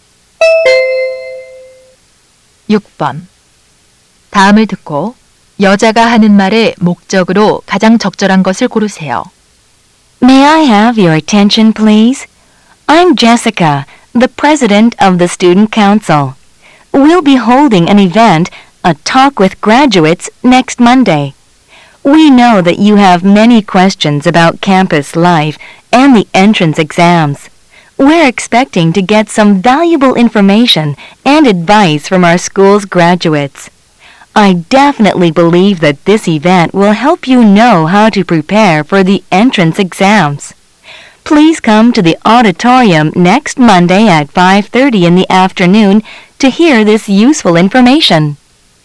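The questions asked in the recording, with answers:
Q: 다음을 듣고 여자가 하는 말의 목적으로 가장 적절한 것을 고르세요.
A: 졸업생과의 대화 행사 참여 안내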